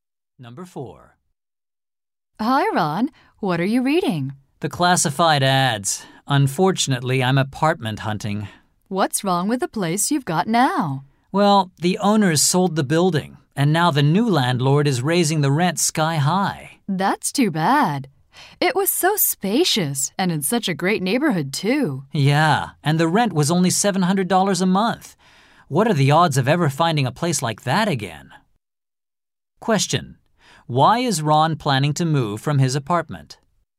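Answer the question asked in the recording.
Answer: The new landlord is raising the rent greatly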